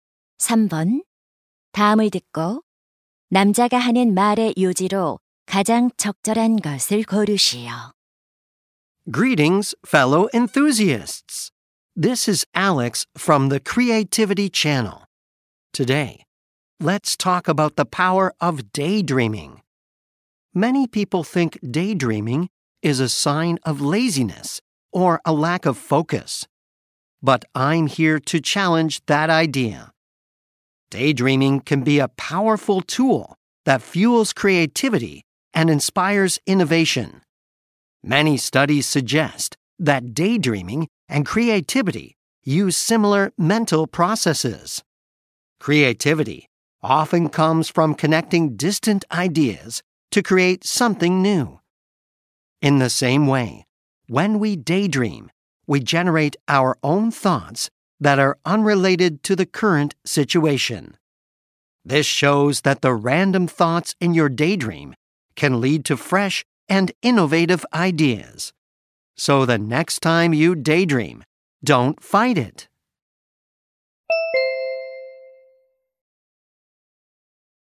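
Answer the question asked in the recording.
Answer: 공상은 창의성을 키우고 혁신에 영감을 줄 수 있다.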